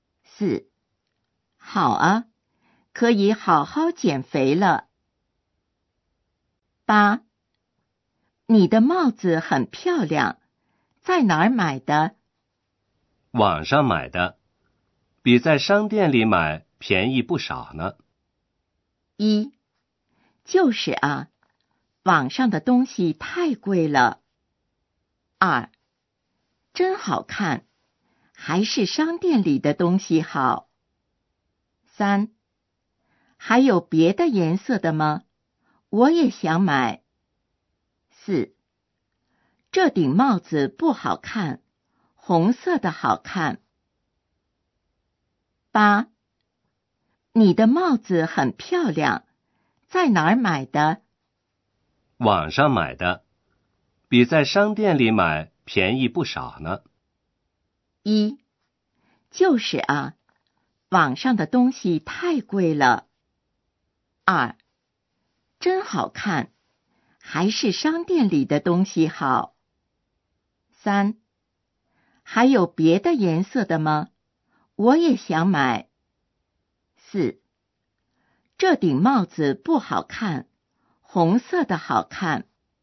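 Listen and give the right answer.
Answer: 三: 还有别的颜色的吗?我也想买。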